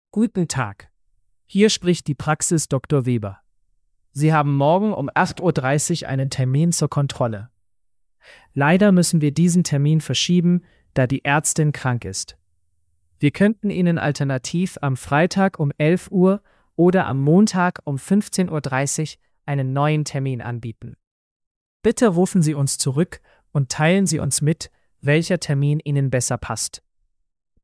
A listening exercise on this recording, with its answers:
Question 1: Warum muss der Termin verschoben werden?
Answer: Die Ärztin ist krank.

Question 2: Welche neuen Termine werden angeboten?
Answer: Freitag um 11 Uhr und Montag um 15.30 Uhr

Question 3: Was soll die Person tun?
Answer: Zurückrufen.

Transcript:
Guten Tag, hier spricht die Praxis Dr. Weber. Sie haben morgen um 8.30 Uhr einen Termin zur Kontrolle. Leider müssen wir diesen Termin verschieben, da die Ärztin krank ist. Wir könnten Ihnen alternativ am Freitag um 11 Uhr oder am Montag um 15.30 Uhr einen neuen Termin anbieten. Bitte rufen Sie uns zurück und teilen Sie uns mit, welcher Termin Ihnen besser passt.

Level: B2-Niveau